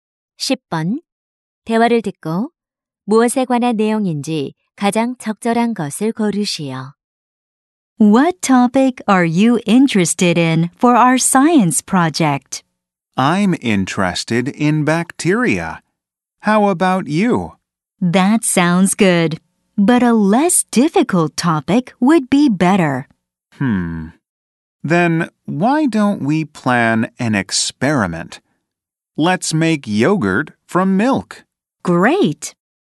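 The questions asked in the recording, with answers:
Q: 대화를 듣고 무엇에 관한 내용인지 가장 적절한 것을 고르시오.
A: 과학 프로젝트 주제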